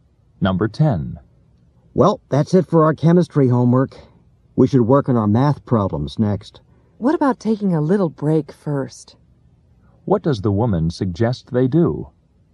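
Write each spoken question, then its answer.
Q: What does the woman suggest they do?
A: Take a short break before the math problems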